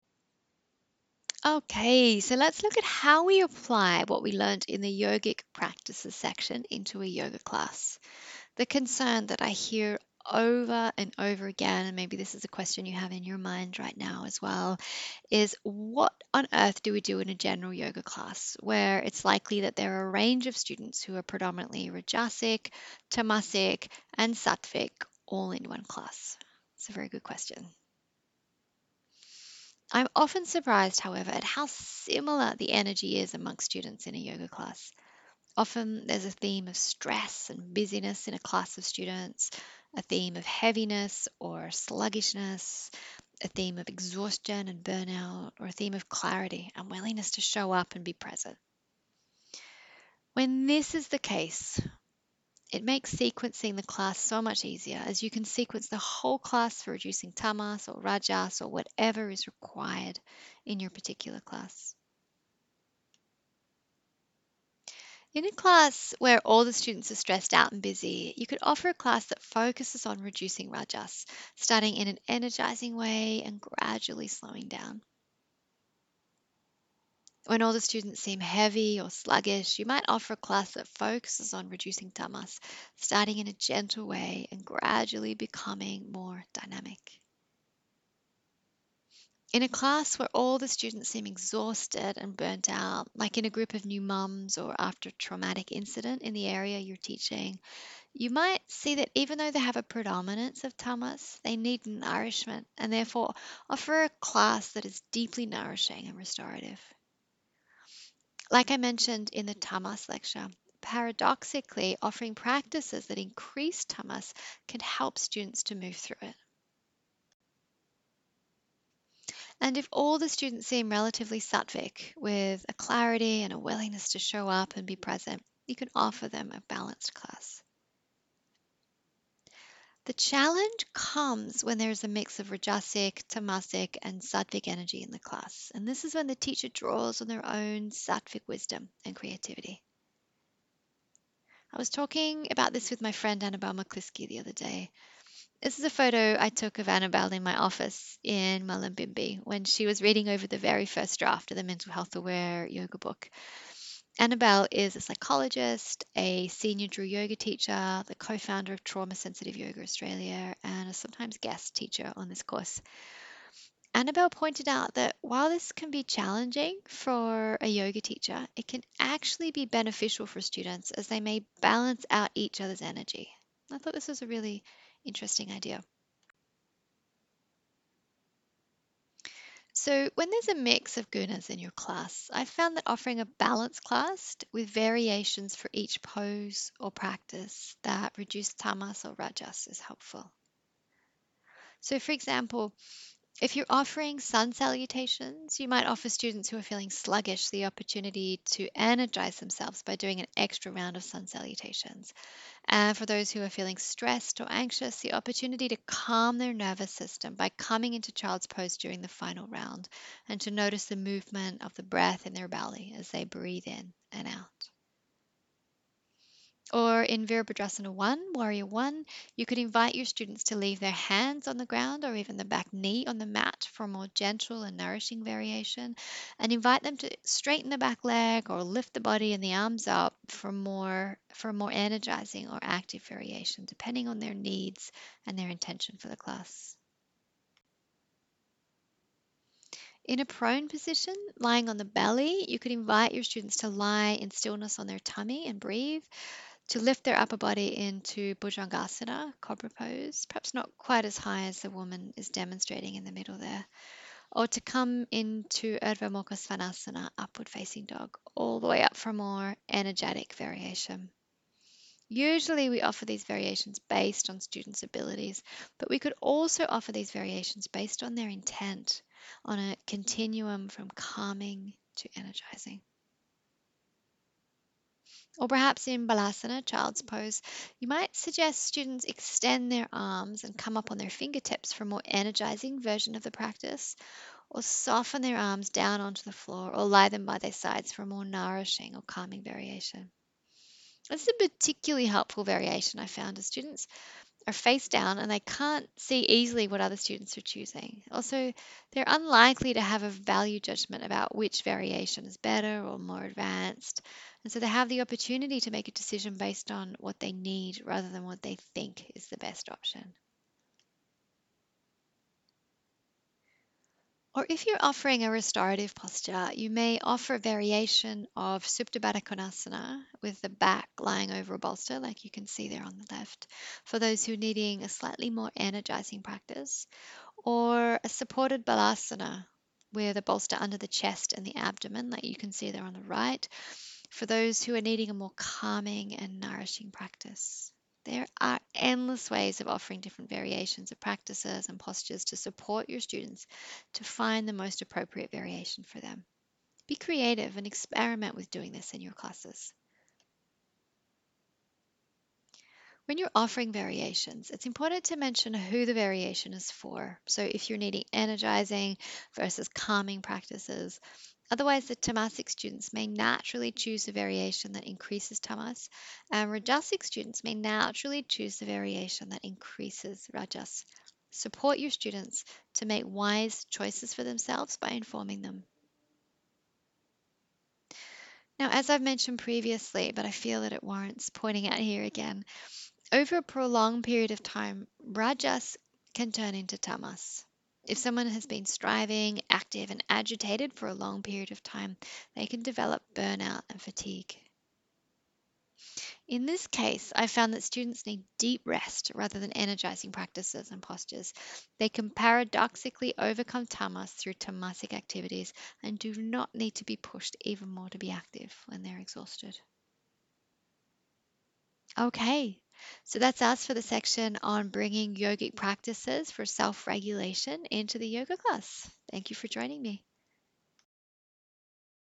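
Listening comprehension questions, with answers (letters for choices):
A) Reducing rajas, by starting in an energising way and gradually slowing the class down.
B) Reducing tamas, by starting in a gentle way and gradually becoming more dynamic.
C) 1 and 2.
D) All of the above.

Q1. If the students in your class seem stressed out and busy, what could you focus on?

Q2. If the students in your class seem heavy or sluggish, what could you focus on?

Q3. If the students in your class seem exhausted and burnt out, what could you focus on?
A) Reducing rajas, by starting in an energising way and gradually slowing the class down.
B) Reducing tamas, by starting in a gentle way and gradually becoming more dynamic.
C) Nourishing your students through gentle and restorative postures.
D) All of the above.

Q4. If the students in your class are all relatively sattvic, with a clarity and willingness to show up and be present, what could you focus on?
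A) Reducing rajas, by starting in an energising way and gradually slowing the class down.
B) Reducing tamas, by starting in a gentle way and gradually becoming more dynamic.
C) A balanced class.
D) None of the above.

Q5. If the students in your class are a mix of sattvic, rajasic and tamasic, what could you do to support them?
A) Nothing, this is an impossible situation and it is best to cancel the class.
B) Draw on your own creativity and wisdom, and offer a balanced class, with variations for each pose or practice that either reduce tamas or rajas.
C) Teach a class with lots of handstand variations.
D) All of the above.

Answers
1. A
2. B
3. C
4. C
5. B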